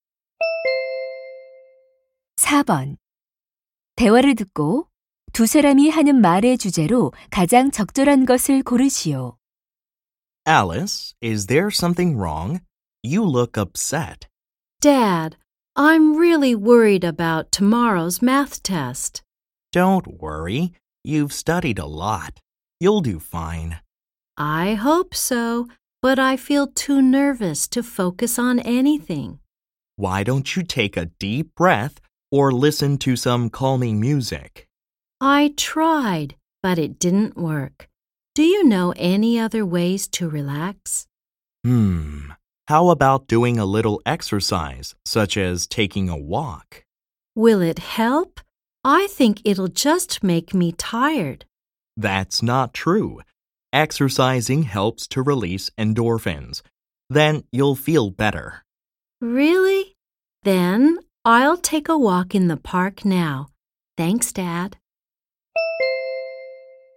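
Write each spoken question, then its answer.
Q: 대화를 듣고 두 사람이 하는 말의 주제로 가장 적절한 것을 고르시오.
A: 긴장을 푸는 데 운동(산책)이 도움이 된다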